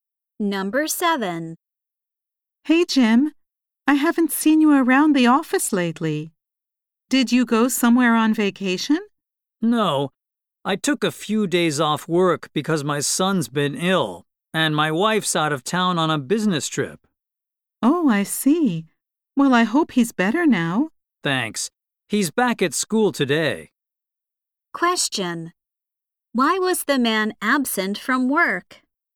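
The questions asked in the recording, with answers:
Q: Why was the man absent from work?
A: He had to look after his sick son.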